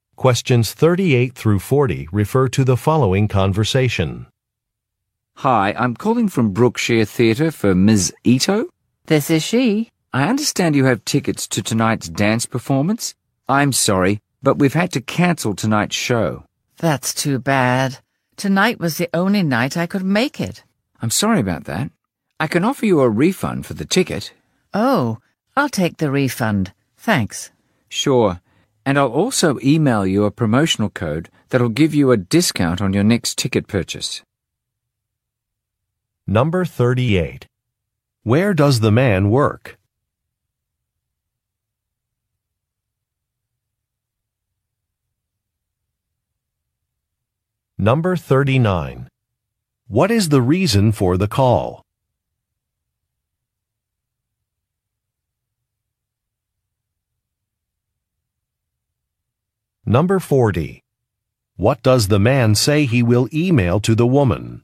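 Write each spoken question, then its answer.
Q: Where does the man work?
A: At a theater (Brookshire Theatre)

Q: What is the reason for the call?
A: To say that a performance has been canceled

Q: What does the man say he will email to the woman?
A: A promotional discount code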